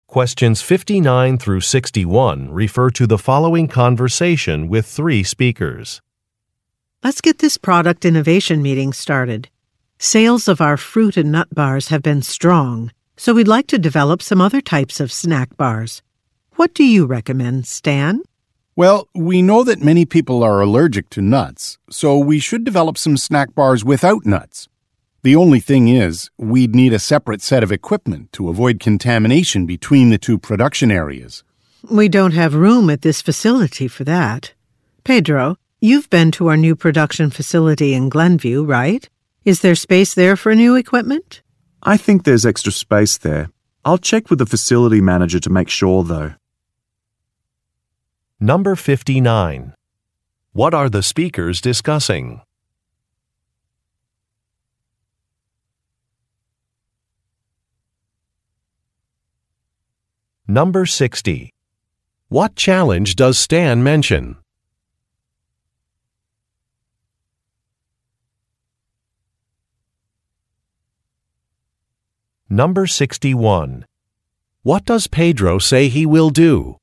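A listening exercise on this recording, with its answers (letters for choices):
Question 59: What are the speakers discussing?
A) Proposing a business merger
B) Relocating a company's headquarters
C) Developing additional products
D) Hiring more employees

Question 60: What challenge does Stan mention?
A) A profit margin will decrease.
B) Additional equipment will be needed.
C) There are not enough job applicants.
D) There are delays in production.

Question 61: What does Pedro say he will do?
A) Contact a facility manager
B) Adjust a budget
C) Change a work schedule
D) Research a product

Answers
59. C
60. B
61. A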